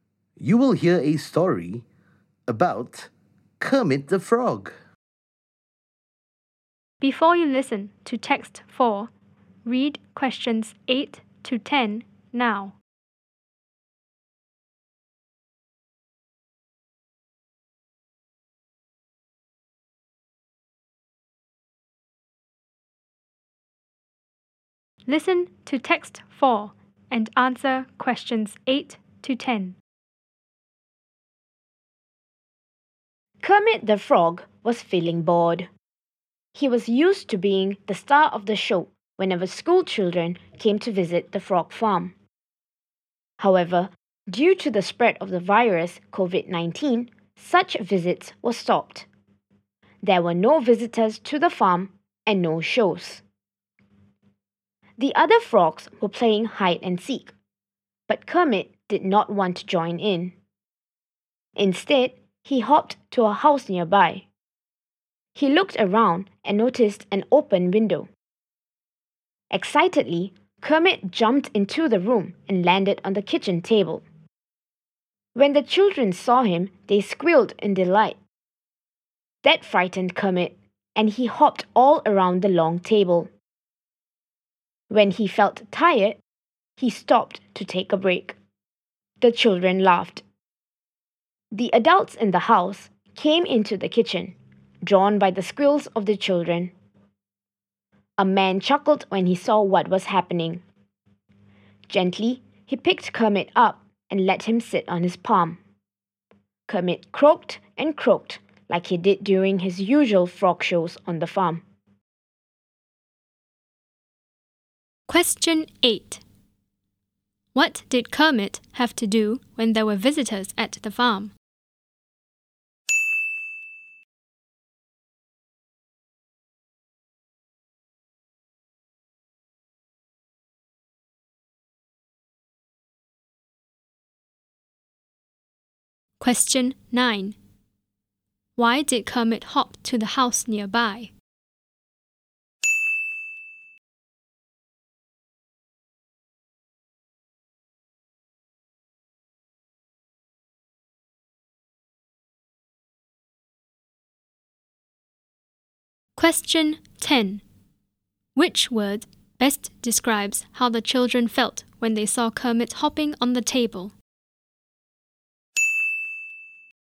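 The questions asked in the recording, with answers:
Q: What did Kermit have to do when there were visitors at the farm?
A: Be the star of the show (perform frog shows, croaking)

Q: Which word best describes how the children felt when they saw Kermit hopping on the table?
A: Delighted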